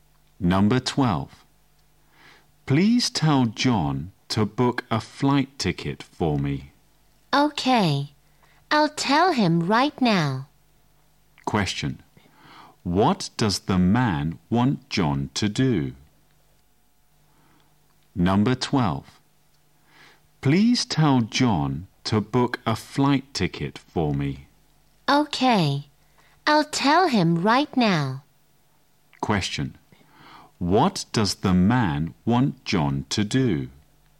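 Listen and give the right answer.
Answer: Book a flight ticket for him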